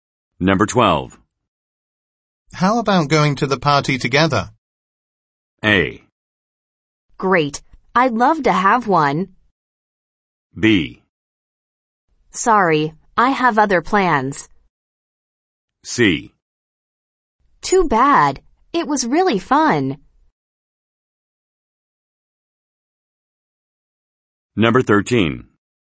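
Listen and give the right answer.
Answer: B: Sorry, I have other plans.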